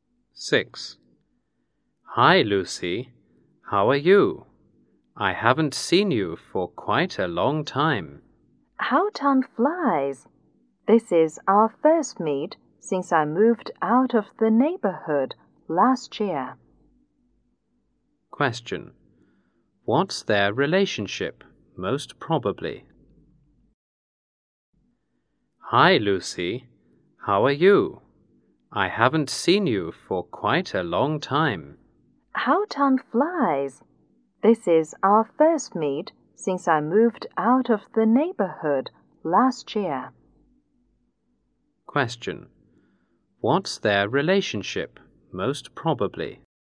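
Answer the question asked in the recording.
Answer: Former neighbors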